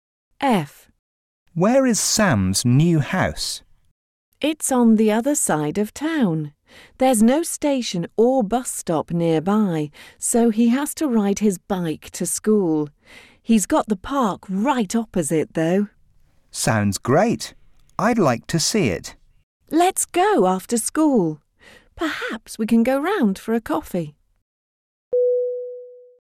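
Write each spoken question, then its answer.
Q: Where is Sam's new house?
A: On the other side of town, opposite the park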